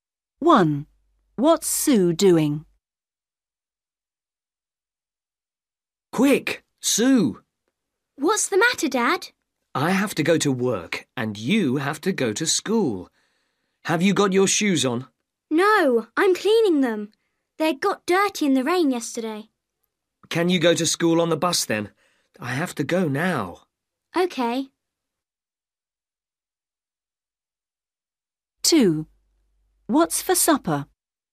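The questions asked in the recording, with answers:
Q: What's Sue doing?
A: Cleaning her shoes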